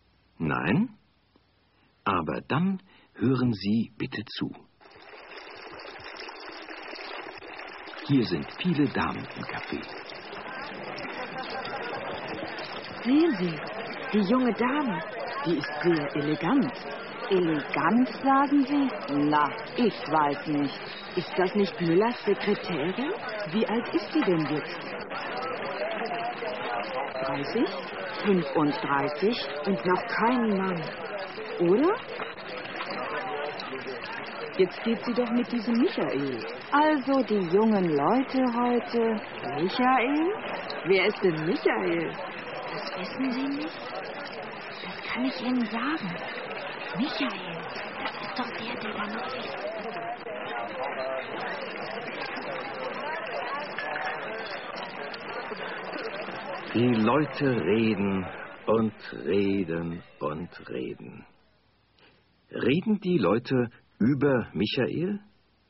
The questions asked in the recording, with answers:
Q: Reden die Leute über Michael?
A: Ja, sie reden über ihn.